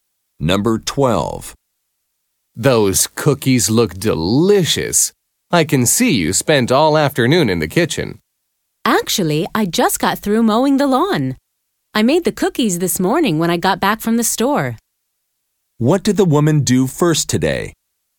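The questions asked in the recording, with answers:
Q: What did the woman do first today?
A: Went to the store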